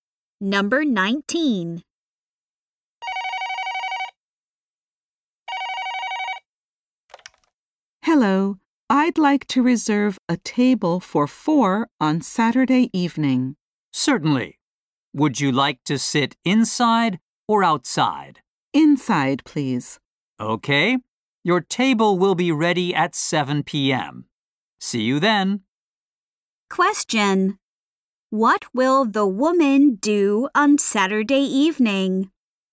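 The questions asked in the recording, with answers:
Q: What will the woman do on Saturday evening?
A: Eat at the restaurant with three other people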